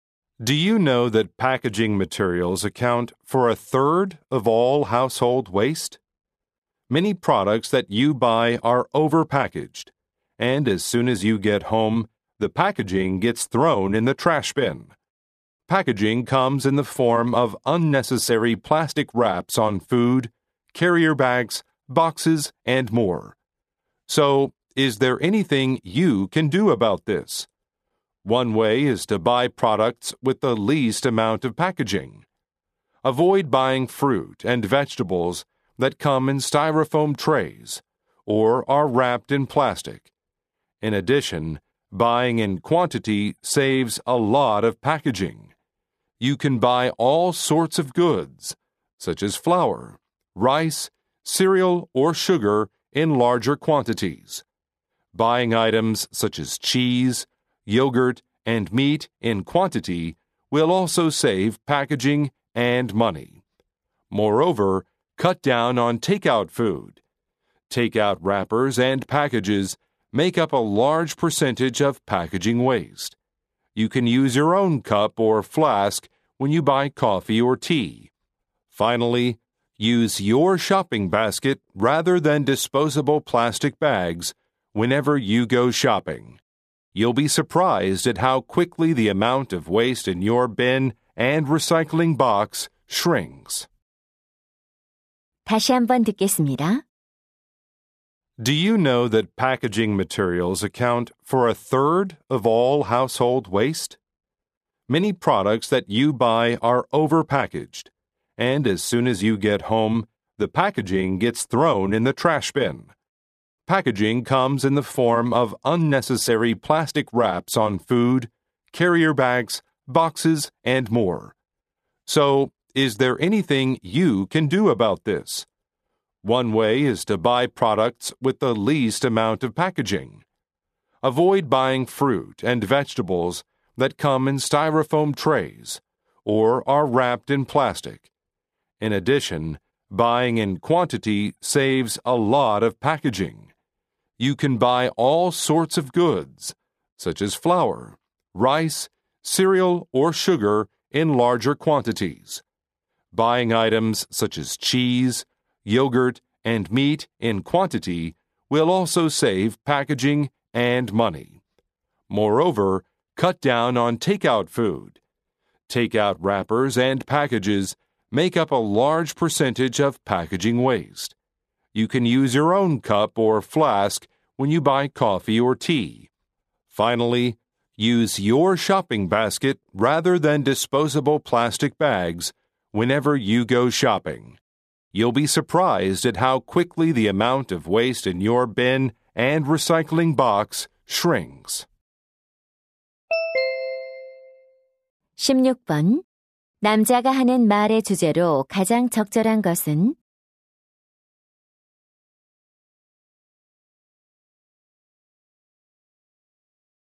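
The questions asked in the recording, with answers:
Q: 남자가 하는 말의 주제로 가장 적절한 것은?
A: 포장 쓰레기를 줄이는 방법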